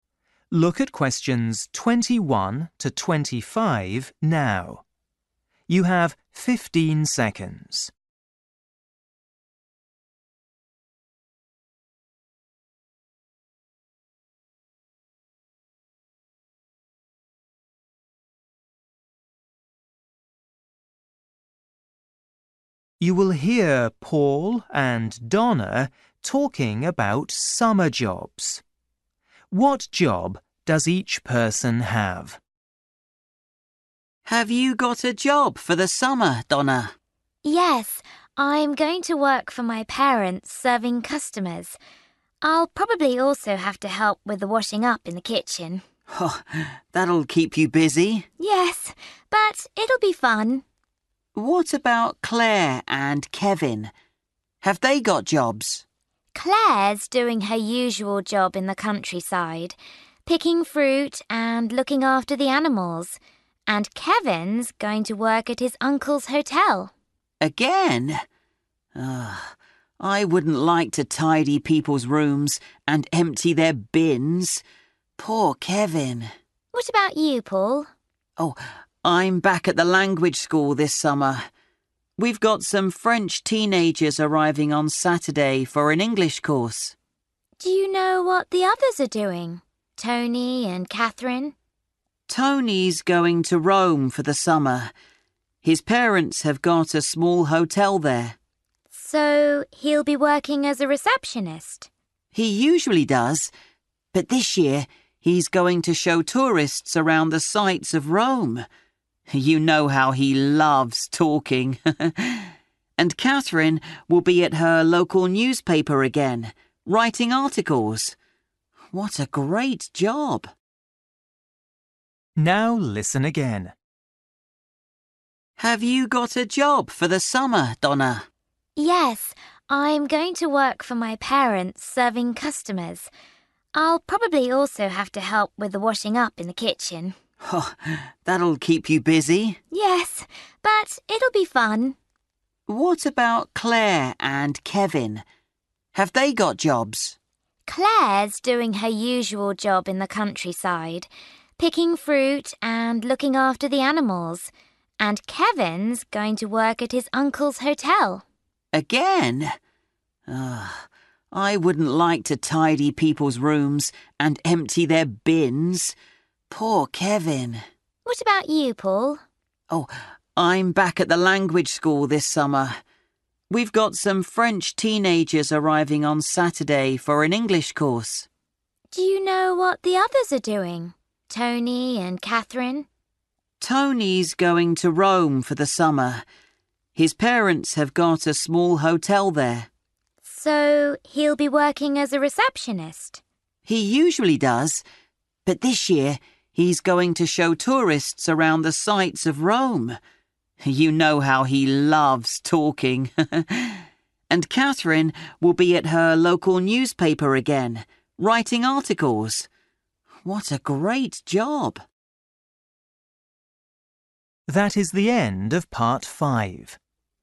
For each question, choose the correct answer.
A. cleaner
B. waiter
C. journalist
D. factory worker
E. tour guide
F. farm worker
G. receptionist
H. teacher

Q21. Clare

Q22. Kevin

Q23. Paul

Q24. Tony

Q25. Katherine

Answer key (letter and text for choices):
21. F. farm worker
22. A. cleaner
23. H. teacher
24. E. tour guide
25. C. journalist

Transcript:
Paul: Have you got a job for the summer, Donna?
Donna: Yes, I'm going to work for my parents, serving customers. I'll probably also have to help with the washing-up in the kitchen.
Paul: That'll keep you busy!
Donna: Yes, but it'll be fun.
Paul: What about Clare and Kevin? Have they got jobs?
Donna: Clare's doing her usual job in the countryside – picking fruit and looking after the animals. And Kevin's going to work at his uncle's hotel.
Paul: Again? I wouldn't like to tidy people's rooms and empty their bins! Poor Kevin! Donna: What about you, Paul?
Paul: I'm back at the language school this summer. We've got some French teenagers arriving on Saturday for an English course.
Donna: Do you know what the others are doing? Tony and Katherine?
Paul: Tony's going to Rome for the summer. His parents have got a small hotel there.
Donna: So he'll be working as a receptionist?
Paul: He usually does. But this year he's going to show tourists around the sights of Rome. You know how he loves talking! And Katherine will be at her local newspaper again, writing articles. What a great job!

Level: KET (A2)